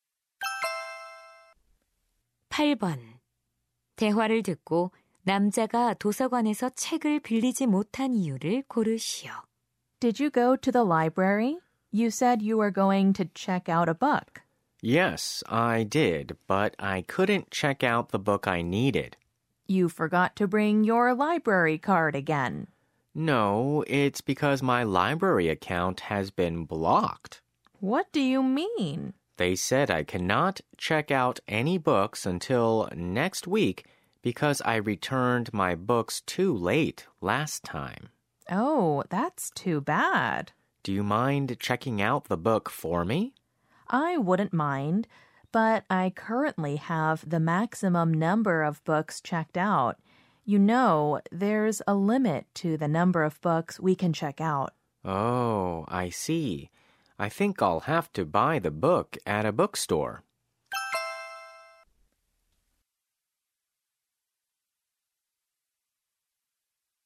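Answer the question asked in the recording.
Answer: 지난번에 책을 늦게 반납해서 도서관 계정이 정지되었기 때문에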